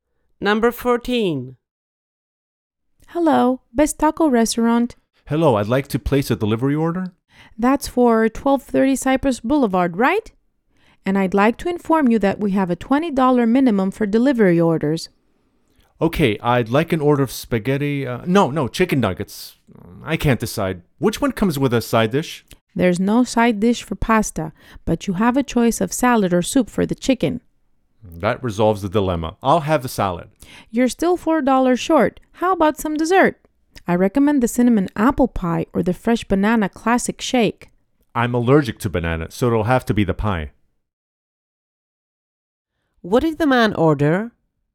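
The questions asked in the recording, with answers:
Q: What did the man order?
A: Chicken nuggets with salad and cinnamon apple pie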